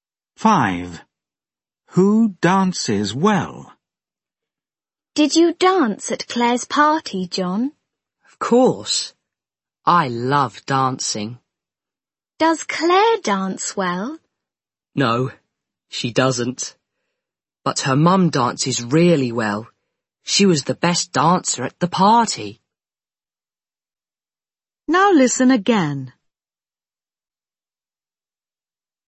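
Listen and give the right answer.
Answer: Claire's mum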